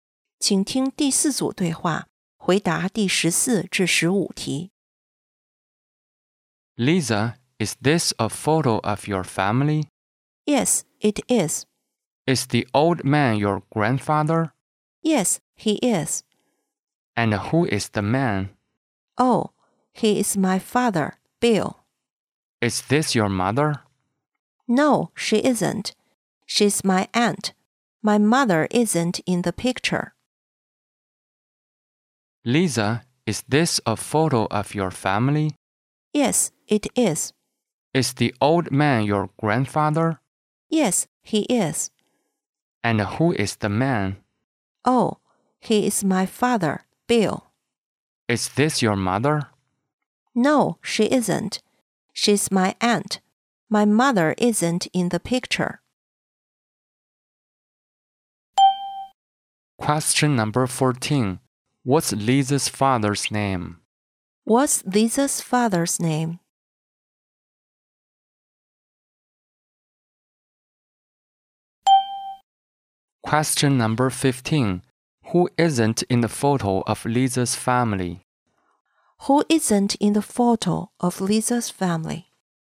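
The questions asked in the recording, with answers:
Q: What's Lisa's father's name?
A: Bill.

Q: Who isn't in the photo of Lisa's family?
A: Her mother.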